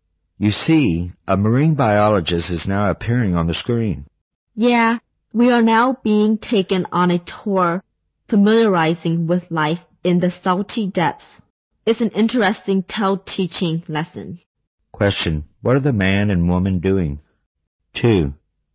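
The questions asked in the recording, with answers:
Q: What are the man and woman doing?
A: Watching a TV program about marine life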